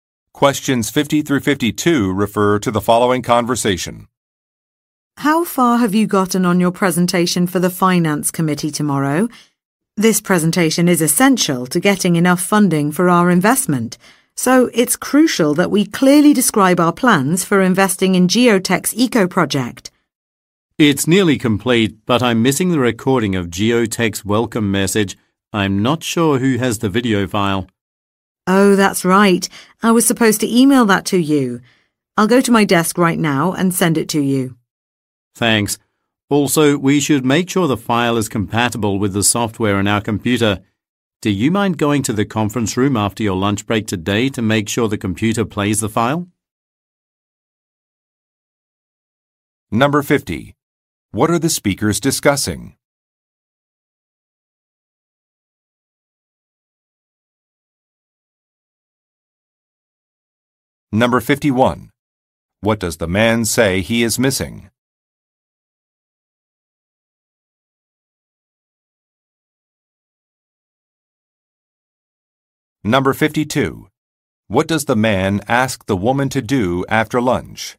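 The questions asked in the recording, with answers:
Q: What are the speakers discussing?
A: A presentation for the Finance Committee

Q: What does the man say he is missing?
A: A recording of Geotech's welcome message (video file)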